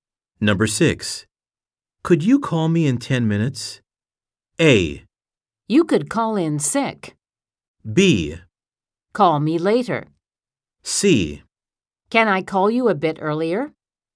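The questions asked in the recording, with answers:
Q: Could you call me in 10 minutes?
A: C: Can I call you a bit earlier?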